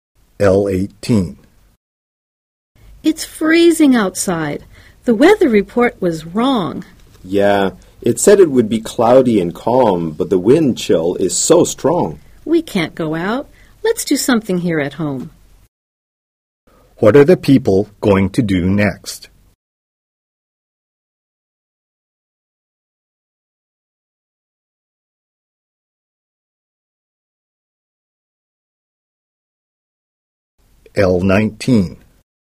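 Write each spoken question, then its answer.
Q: What are the people going to do next?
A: Stay and do something at home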